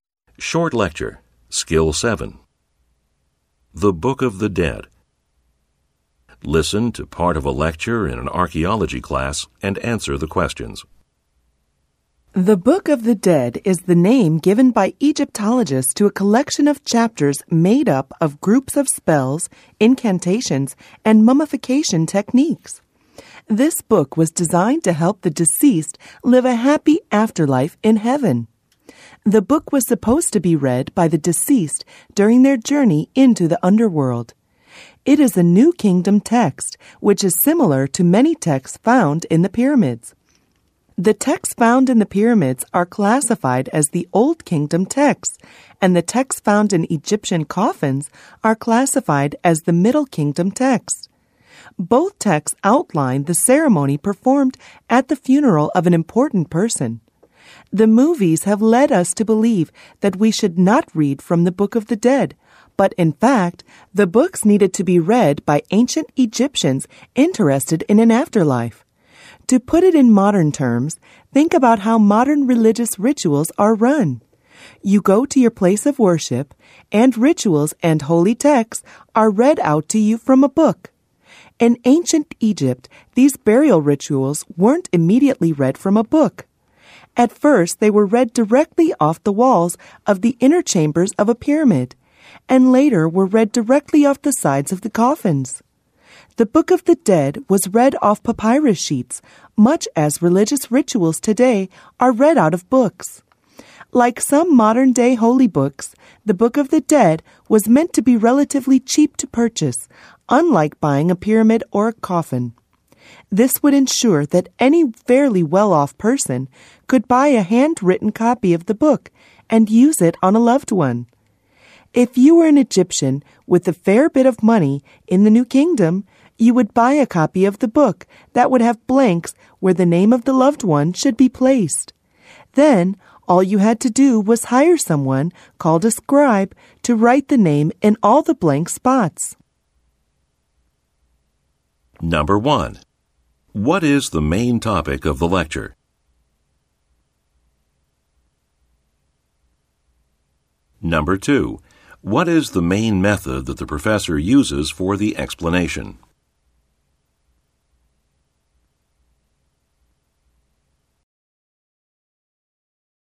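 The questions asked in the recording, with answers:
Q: What is the main topic of the lecture?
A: The Egyptian Book of the Dead and how it was used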